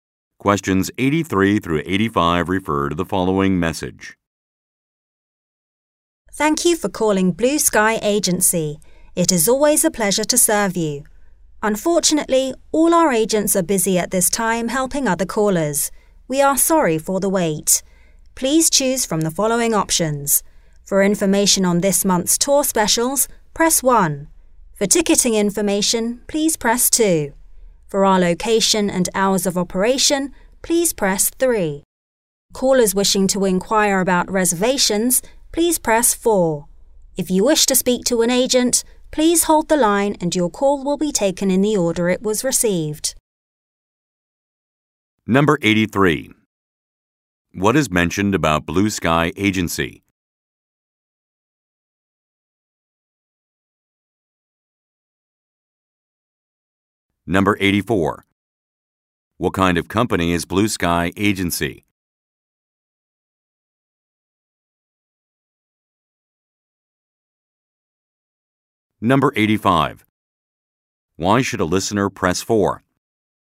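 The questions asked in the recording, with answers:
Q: What kind of company is Blue Sky Agency?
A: A travel agency

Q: Why should a listener press 4?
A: To inquire about reservations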